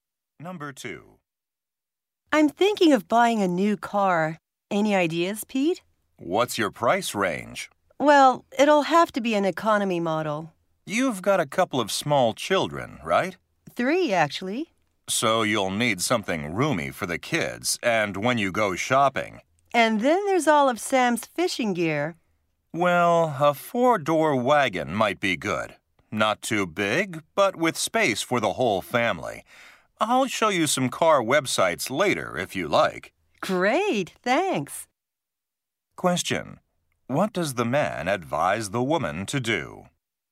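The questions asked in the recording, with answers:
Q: What does the man advise the woman to do?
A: Buy a 4-door wagon with space for the whole family.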